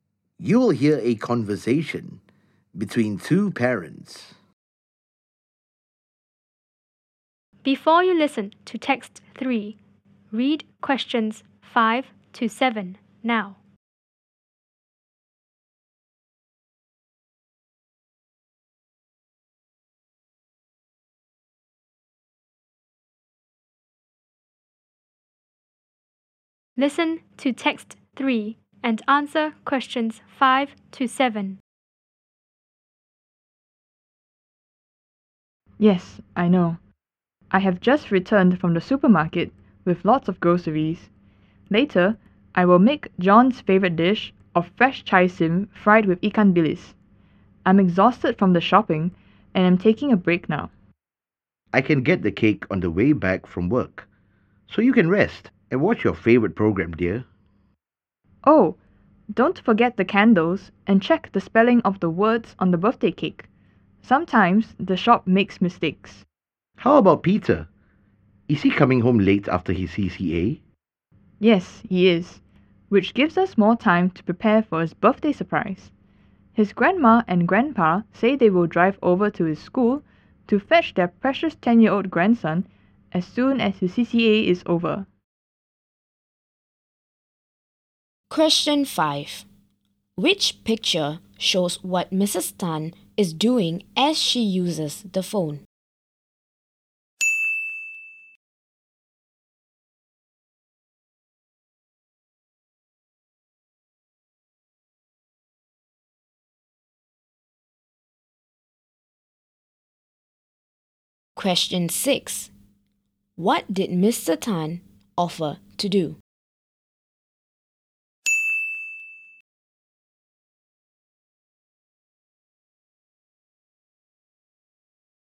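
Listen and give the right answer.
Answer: Get the birthday cake on the way back from work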